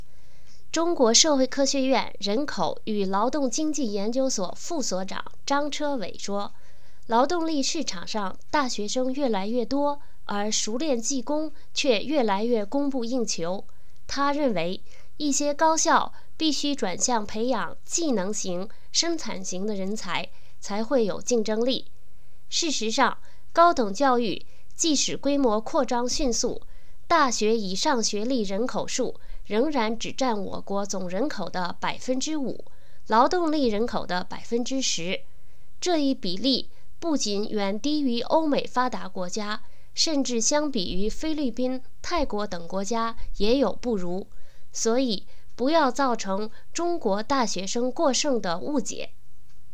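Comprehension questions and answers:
Please answer the following questions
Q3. 中国大学以上学历人口数占总人口的比例是多少?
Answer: 5%

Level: 3rd Year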